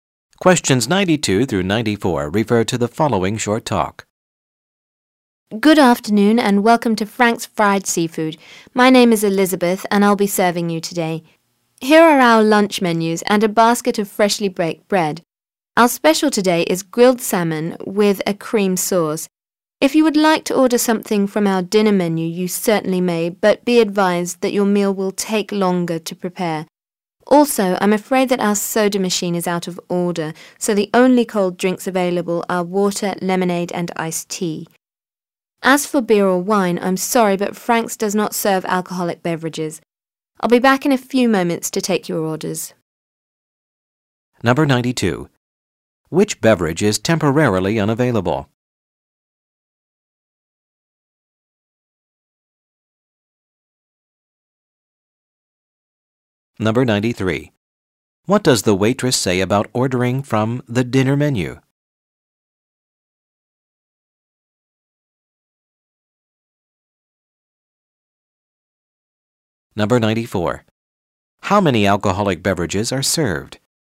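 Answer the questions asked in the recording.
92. Soda
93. The meal will take longer to prepare
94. None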